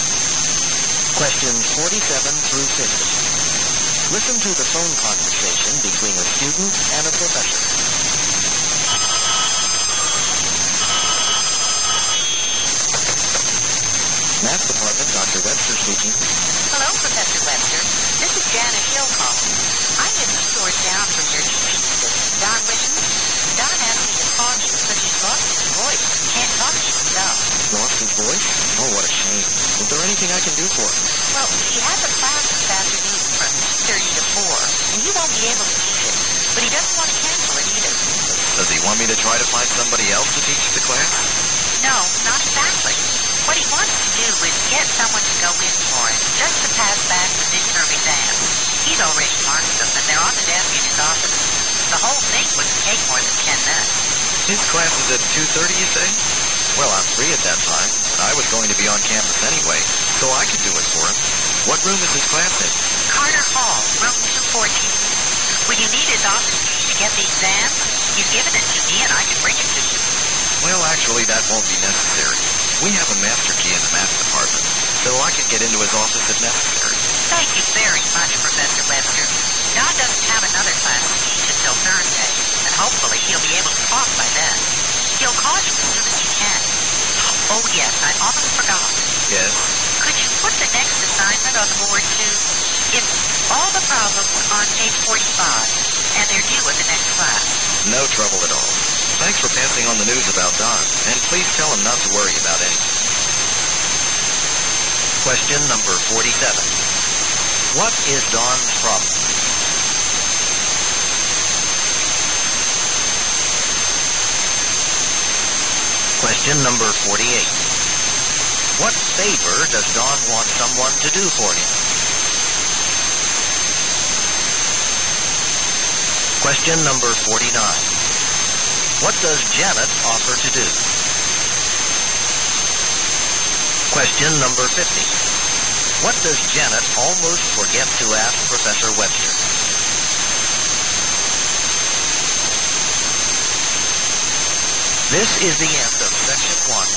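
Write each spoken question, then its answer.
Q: What is Don's problem?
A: He has lost his voice

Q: What favor does Don want someone to do for him?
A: Go to his class and hand back the midterm exams

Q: What does Janet offer to do?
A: Bring Don's office key to Professor Webster

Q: What does Janet almost forget to ask Professor Webster?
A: To put the next assignment on the board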